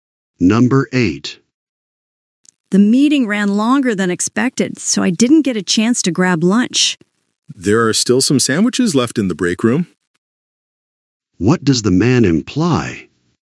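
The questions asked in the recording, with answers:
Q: What does the man imply?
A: The woman can get a sandwich in the break room.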